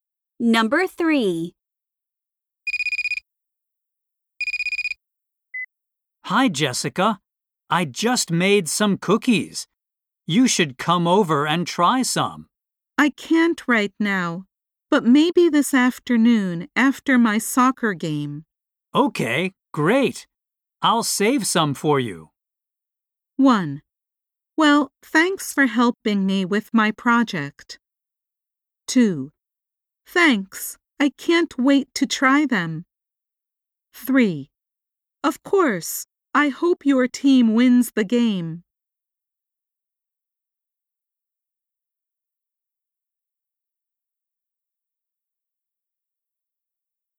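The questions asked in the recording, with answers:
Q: Okay, great. I'll save some for you.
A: 2: Thanks. I can't wait to try them.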